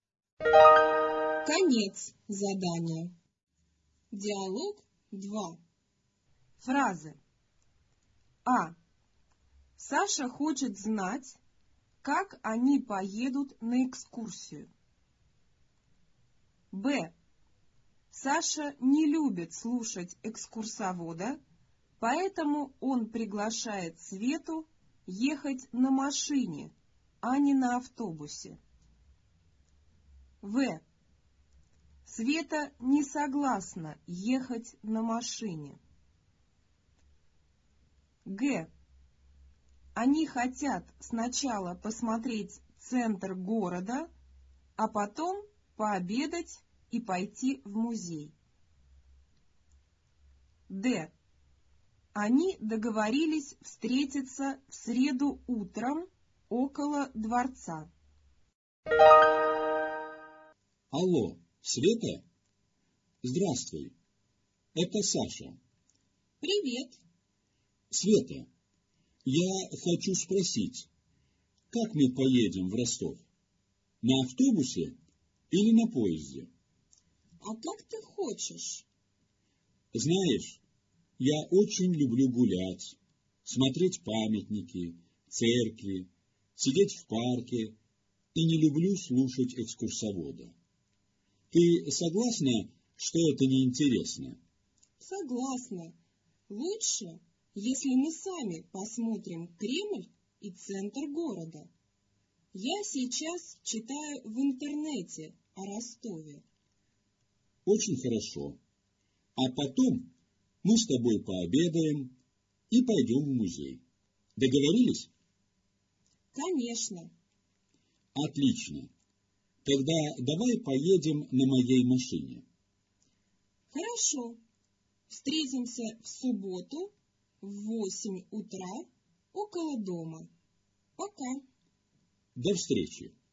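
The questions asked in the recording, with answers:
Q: Саша хочет знать, как они поедут на экскурсию.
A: плюс (верно)

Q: Света не согласна ехать на машине.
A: минус (неверно)

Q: Они хотят сначала посмотреть центр города, а потом пообедать и пойти в музей.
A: плюс (верно)

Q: Они договорились встретиться в среду утром около дворца.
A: минус (неверно)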